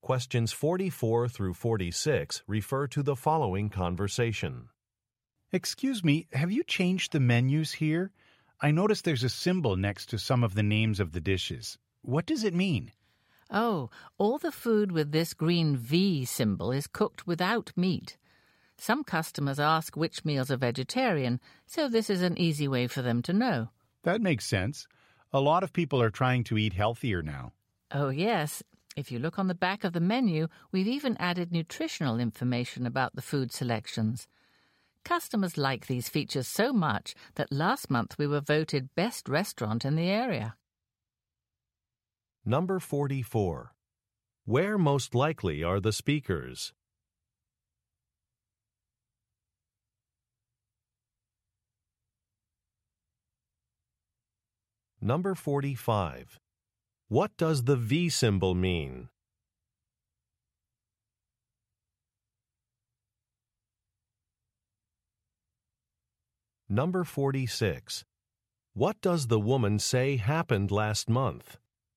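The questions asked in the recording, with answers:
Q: Where most likely are the speakers?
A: At a restaurant

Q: What does the V symbol mean?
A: The food is cooked without meat (vegetarian)

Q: What does the woman say happened last month?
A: The restaurant was voted best restaurant in the area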